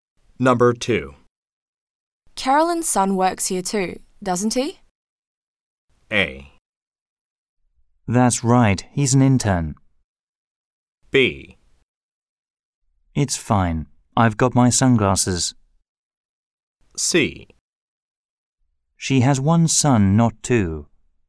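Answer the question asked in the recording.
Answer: A: That's right, he's an intern.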